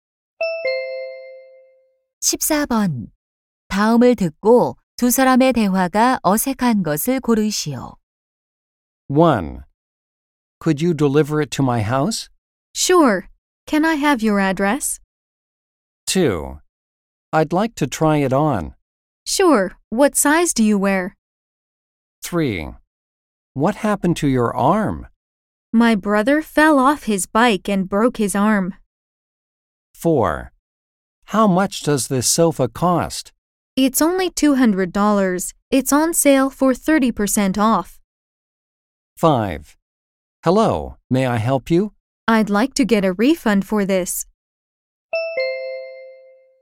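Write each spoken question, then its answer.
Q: 다음을 듣고 두 사람의 대화가 어색한 것을 고르시오.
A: 3: What happened to your arm? / My brother fell off his bike and broke his arm.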